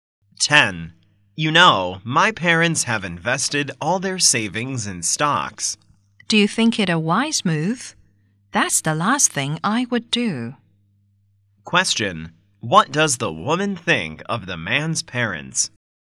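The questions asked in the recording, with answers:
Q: What does the woman think of the man's parents?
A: Their investment in stocks is unwise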